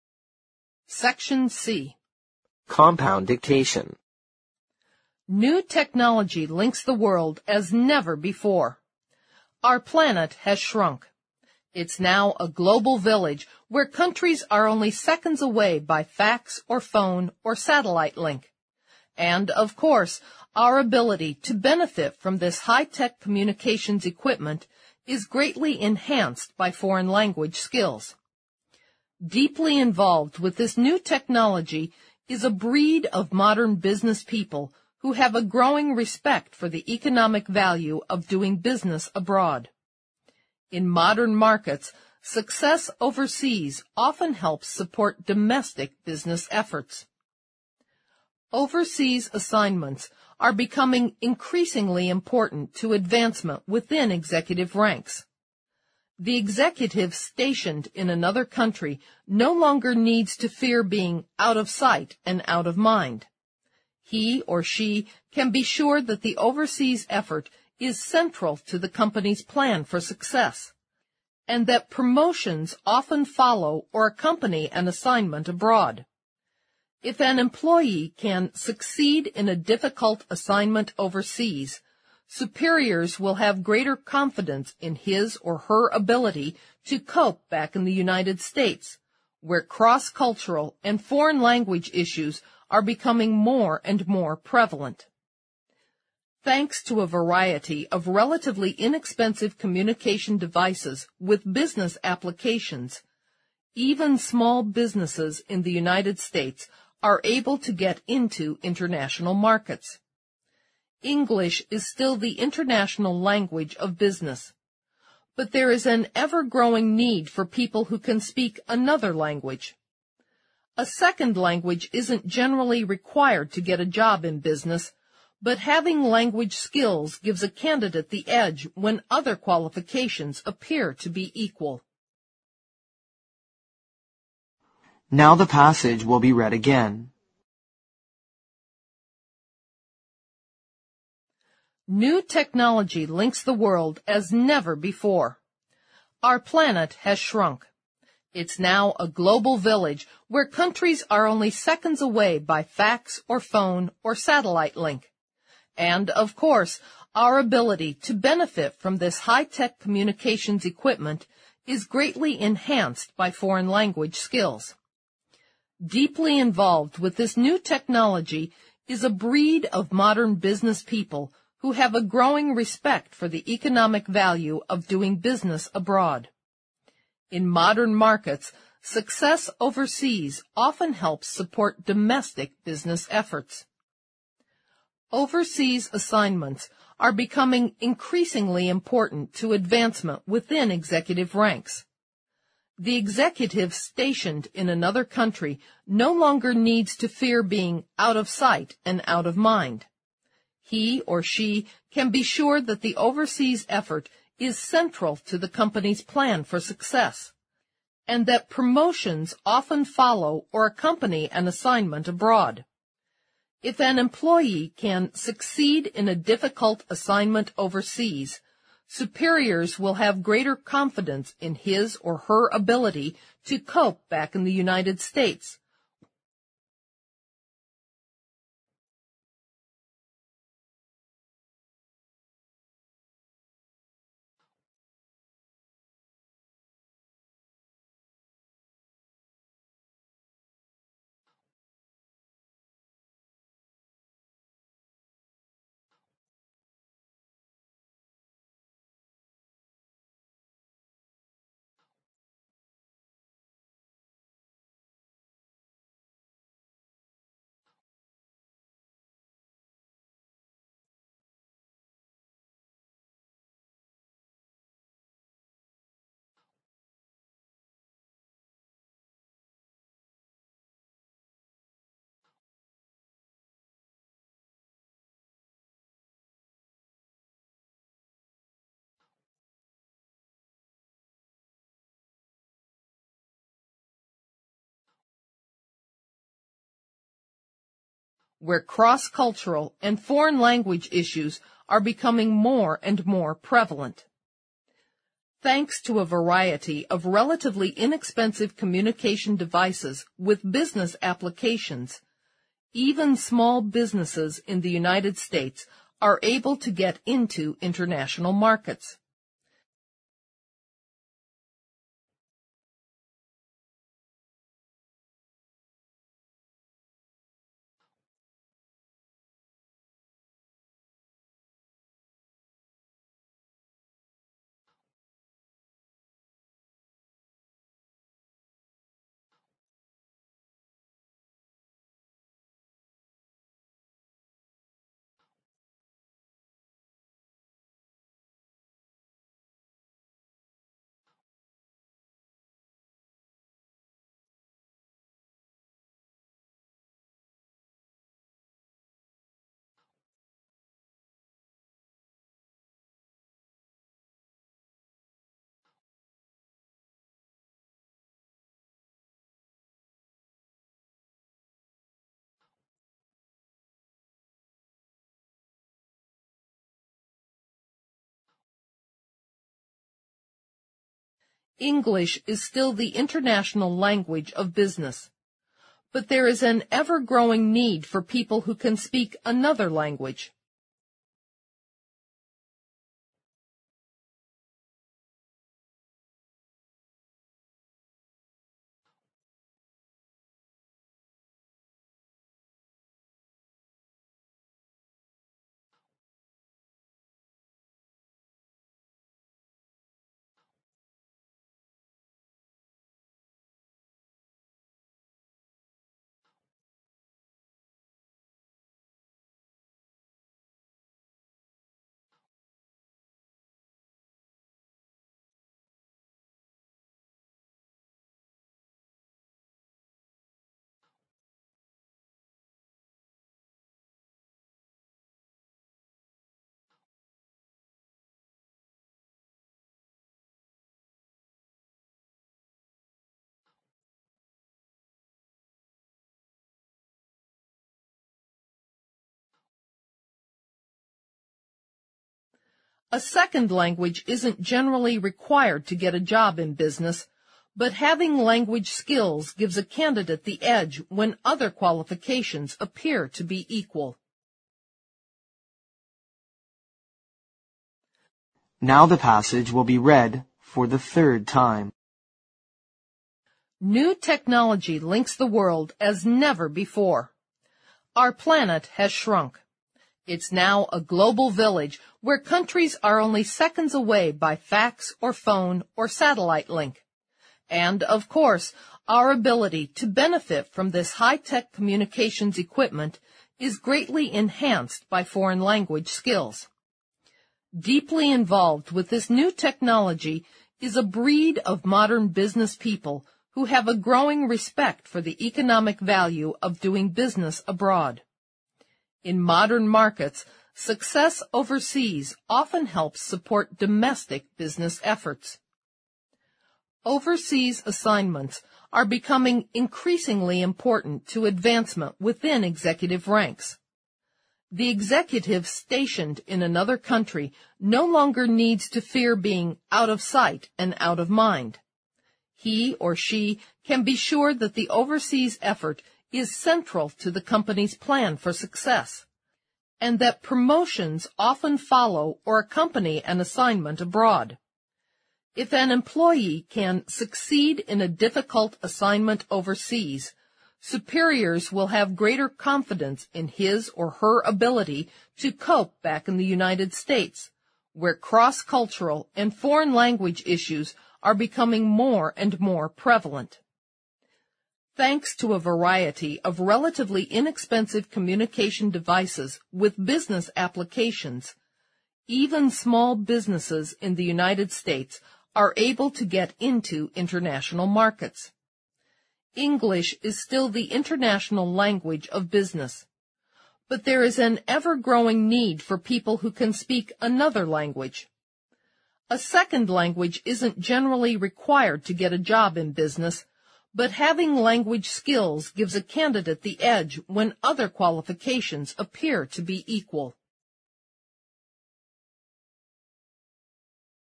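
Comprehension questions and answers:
Compound Dictation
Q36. Our planet has (36) ______ .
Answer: shrunk

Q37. It's now a "global village" where countries are only seconds away by fax or phone or (37) ______ link.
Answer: satellite

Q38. And, of course, our ability to benefit from this high-tech communications equipment is greatly (38) ______ by foreign language skills.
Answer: enhanced

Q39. Deeply involved with this new technology is a (39) ______ of modern business people who have a growing respect for the economic value of doing business abroad.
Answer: breed

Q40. In modern markets, success overseas often helps support (40) ______ business efforts.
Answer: domestic

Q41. Overseas assignments are becoming (41) ______ important to advancement within executive ranks.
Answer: increasingly

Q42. The executive (42) ______ in another country no longer needs to fear being "out of sight and out of mind."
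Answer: stationed

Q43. He or she can be sure that the overseas effort is (43) ______ to the company's plan for success, and that promotions often follow or accompany an assignment abroad.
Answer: central

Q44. If an employee can (44) _____________________________________________________________________________________ where cross-cultural and foreign language issues are becoming more and more prevalent.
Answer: succeed in a difficult assignment overseas, superiors will have greater confidence in his or her ability to cope back in the United States,

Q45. Thanks to a variety of relatively inexpensive communications devices with business applications, (45) ___________________________________________________________________ .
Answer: even small businesses in the United States are able to get into international markets

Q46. (46) ____________________________________________________ .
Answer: But there is an ever-growing need for people who can speak another language

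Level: 六级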